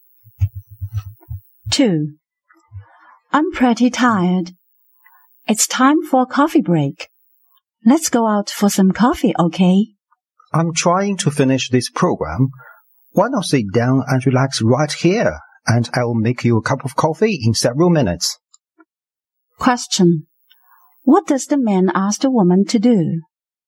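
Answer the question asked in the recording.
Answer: Relax there while he makes her coffee.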